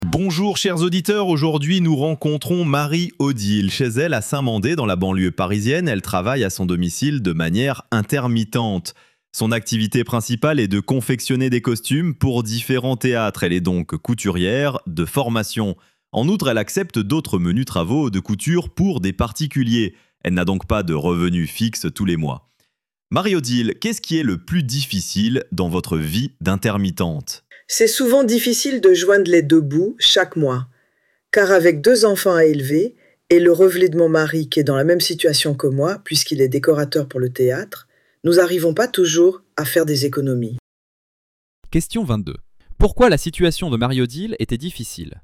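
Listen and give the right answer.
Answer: Parce qu'elle et son mari n'ont pas de revenus fixes et ont du mal à joindre les deux bouts.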